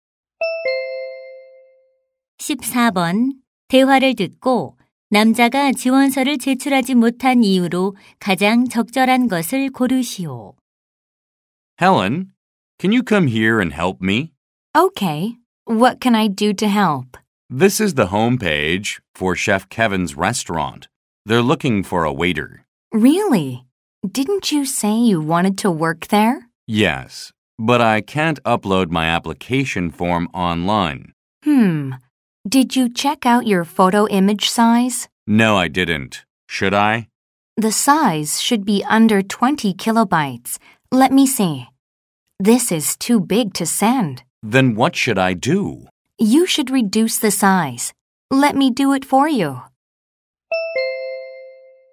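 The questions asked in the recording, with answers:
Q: 대화를 듣고 남자가 지원서를 제출하지 못한 이유로 가장 적절한 것을 고르시오.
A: 사진 파일 크기가 너무 커서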